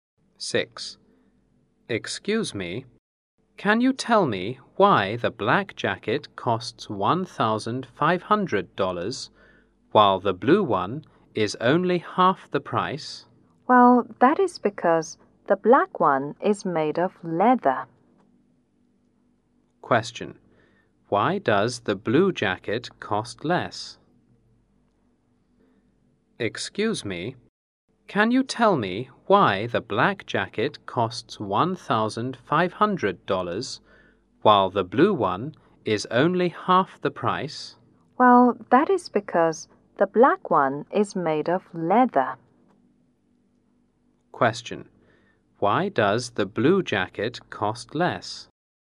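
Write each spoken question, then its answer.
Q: Why does the blue jacket cost less?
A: Because it is not made of leather.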